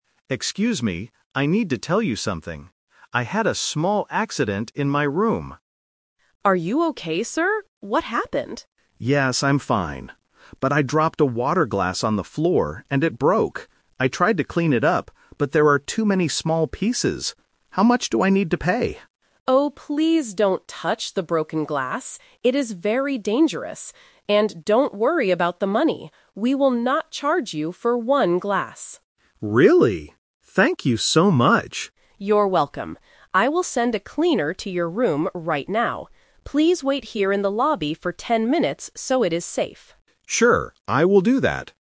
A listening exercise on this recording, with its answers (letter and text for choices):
Listen to a guest talking to a hotel manager. Choose the correct answer (A, B, or C) for each question.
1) What did the guest break in his room?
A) A window.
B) A television.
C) A water glass.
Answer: C) A water glass.

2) What was the guest worried about?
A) Paying money for the broken item.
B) Moving to a new hotel room.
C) Cutting his hand.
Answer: A) Paying money for the broken item.

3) What does the manager tell the guest to do? (The Twist)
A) Clean the floor carefully.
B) Wait in the hotel lobby.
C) Pay for a new glass.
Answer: B) Wait in the hotel lobby.

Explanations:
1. The guest clearly states what happened: "I dropped a water glass on the floor, and it broke."
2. The guest expects to pay a fine. He asks, "How much do I need to pay?"
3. This is the Twist. The guest tried to clean it himself, but the manager changes the plan for safety. She says, "Please wait here in the lobby for ten minutes so it is safe."

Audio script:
Guest: Excuse me. I need to tell you something. I had a small accident in my room.
Manager: Are you okay, sir? What happened?
Guest: Yes, I'm fine. But I dropped a water glass on the floor, and it broke. I tried to clean it up, but there are too many small pieces. How much do I need to pay?
Manager: Oh, please don't touch the broken glass! It is very dangerous. And don't worry about the money. We will not charge you for one glass.
Guest: Really? Thank you so much.
Manager: You're welcome. I will send a cleaner to your room right now. Please wait here in the lobby for ten minutes so it is safe.
Guest: Sure, I will do that.